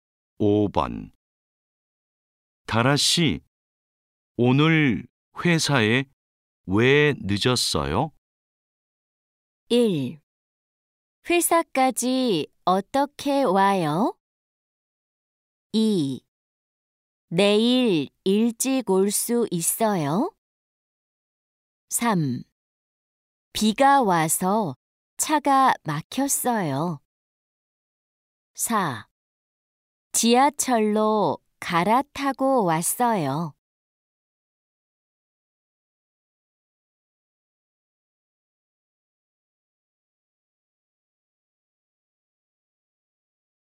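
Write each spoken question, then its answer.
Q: 다라 씨, 오늘 회사에 왜 늦었어요?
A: 3: 비가 와서 차가 막혔어요.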